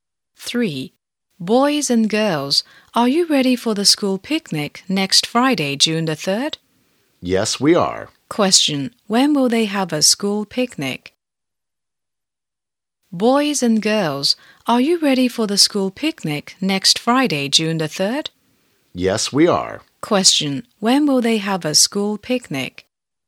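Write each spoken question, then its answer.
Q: When will they have a school picnic?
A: Next Friday, June the 3rd.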